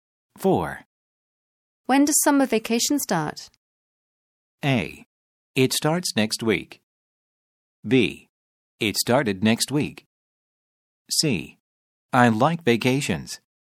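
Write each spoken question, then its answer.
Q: When does summer vacation start?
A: A: It starts next week.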